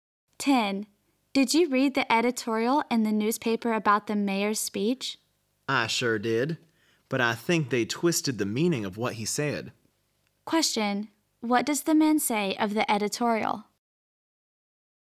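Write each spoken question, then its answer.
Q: What does the man say of the editorial?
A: It twisted what the mayor said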